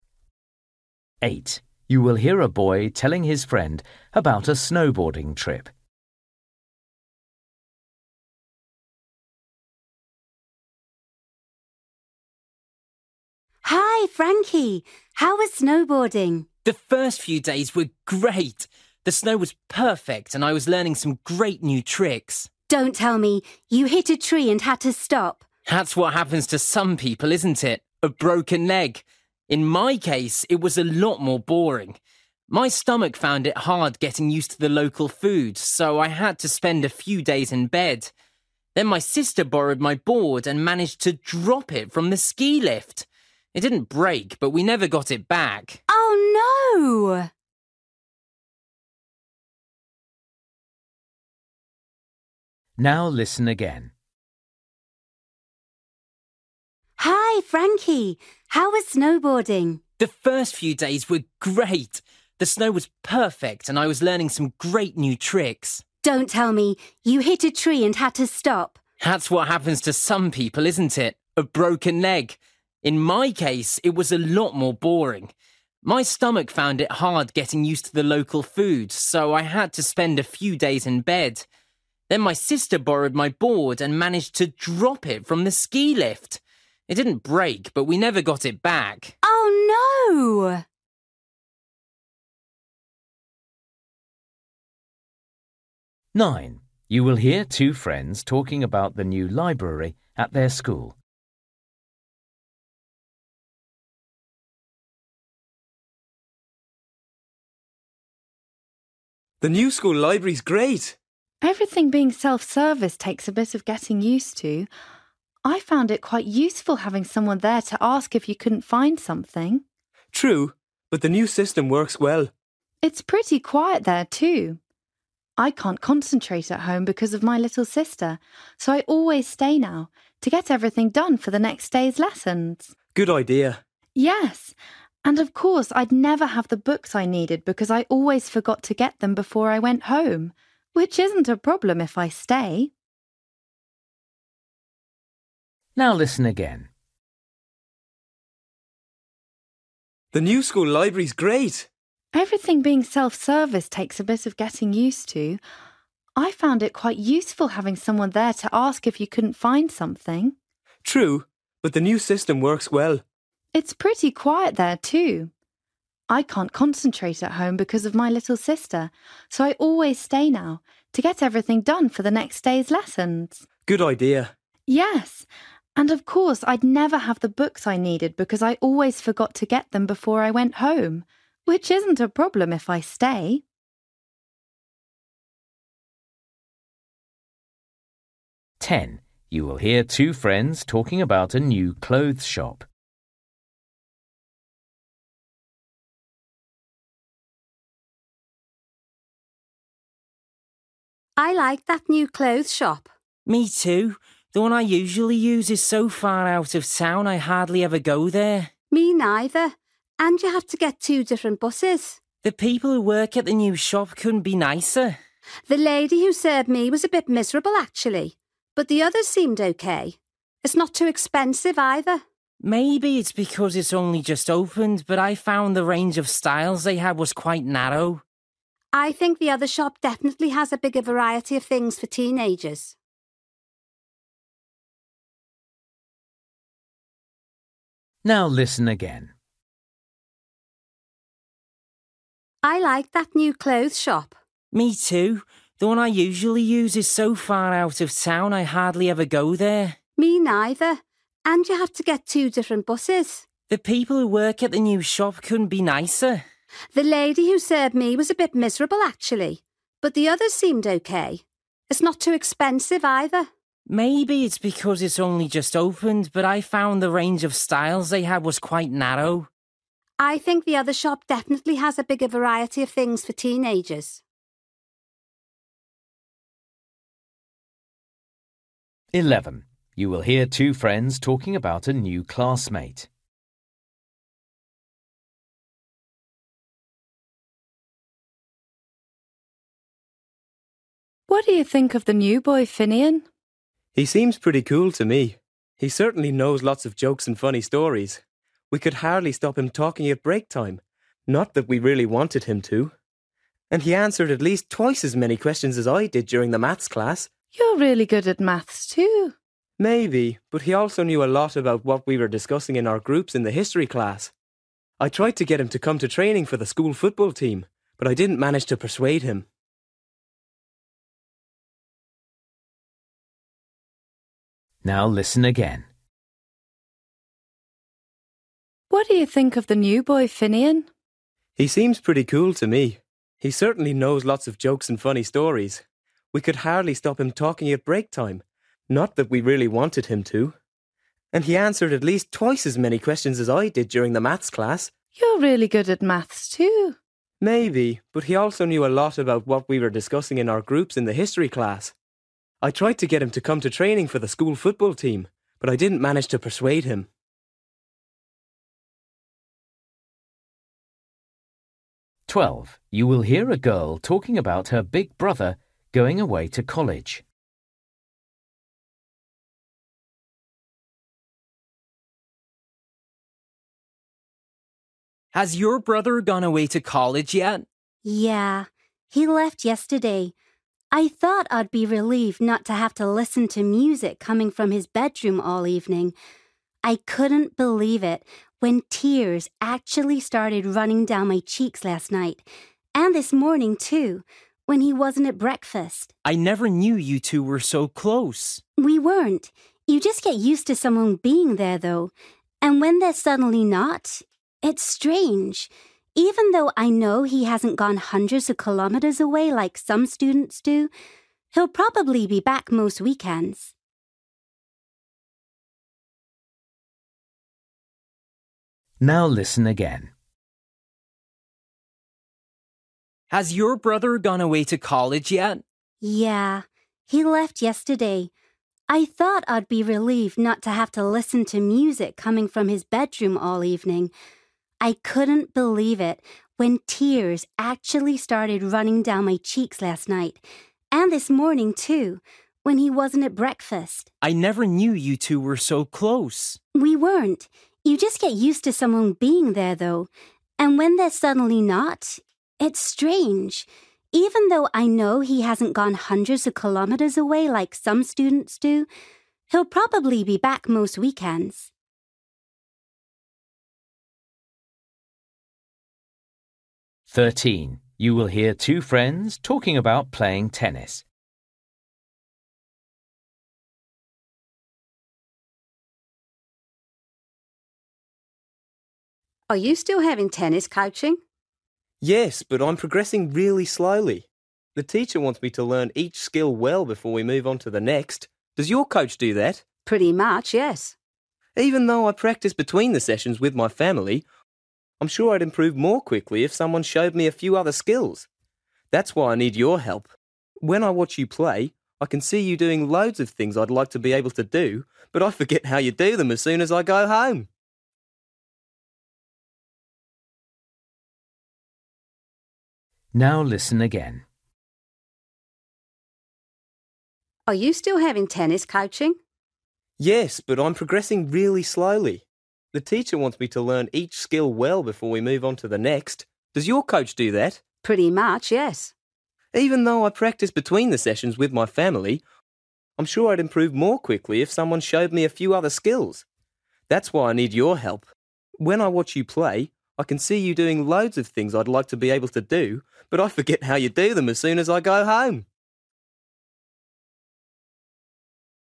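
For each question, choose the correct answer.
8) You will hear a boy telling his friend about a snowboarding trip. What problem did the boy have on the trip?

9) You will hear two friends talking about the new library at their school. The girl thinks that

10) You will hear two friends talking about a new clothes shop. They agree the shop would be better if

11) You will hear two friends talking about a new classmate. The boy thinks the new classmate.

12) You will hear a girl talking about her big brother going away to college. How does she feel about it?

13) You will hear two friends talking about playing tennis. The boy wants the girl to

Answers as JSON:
{"8": "He got ill from the local food and had to spend a few days in bed.", "9": "it is a good quiet place to do her homework after school.", "10": "it had a wider range of styles.", "11": "is clever and knows a lot.", "12": "She is surprised to feel sad and miss him.", "13": "teach him some new skills."}

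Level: Luyện nghe trình độ B1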